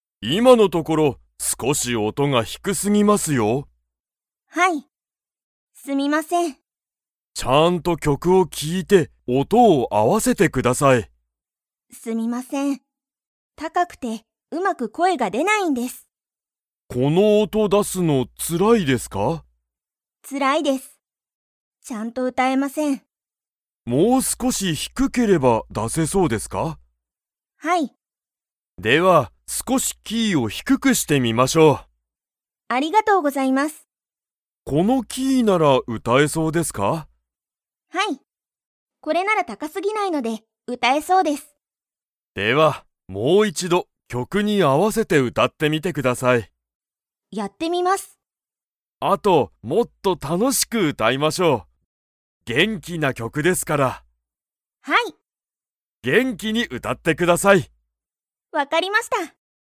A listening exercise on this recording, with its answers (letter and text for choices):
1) サキは、曲きょくの音おとが うまく声こえが出でない。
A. 低ひくくて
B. 高たかくて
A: B. 高たかくて

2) サキは、どんな歌うたを歌うたっていますか?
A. かわいい歌うた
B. きれいな歌うた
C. 怖こわい歌うた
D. 元気げんきな歌うた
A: D. 元気げんきな歌うた

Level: Level 3